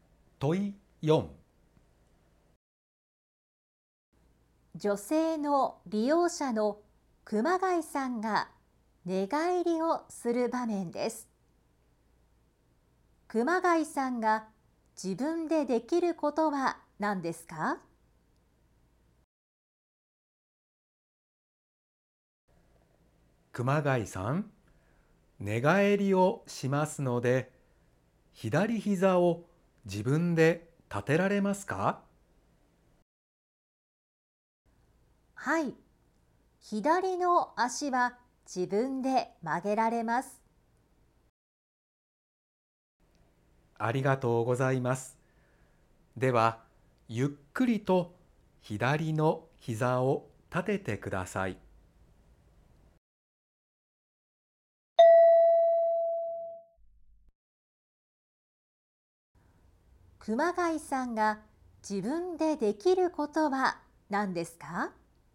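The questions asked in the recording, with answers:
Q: 熊谷さんが自分でできることは何ですか?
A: 左膝を立てること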